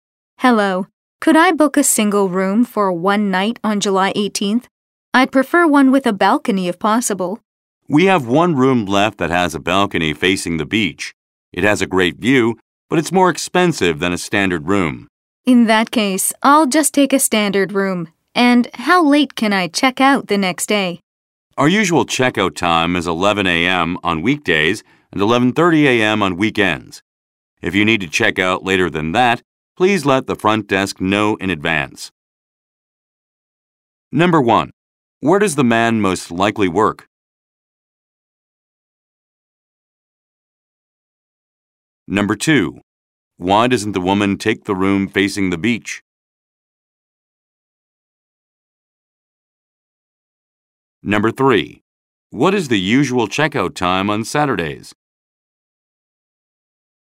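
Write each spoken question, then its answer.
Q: Where does the man most likely work?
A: At a hotel

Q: Why doesn't the woman take the room facing the beach?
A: It is more expensive than a standard room

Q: What is the usual checkout time on Saturdays?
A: 11:30 a.m.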